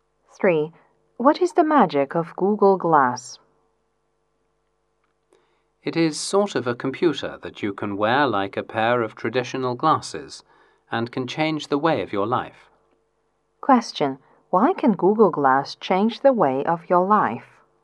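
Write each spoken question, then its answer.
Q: Why can Google Glass change the way of your life?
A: It is a computer you can wear like traditional glasses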